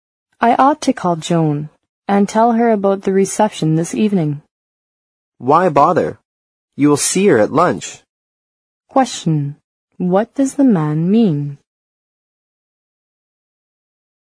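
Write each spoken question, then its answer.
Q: What does the man mean?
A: There's no need to call Joan; the woman can tell her at lunch.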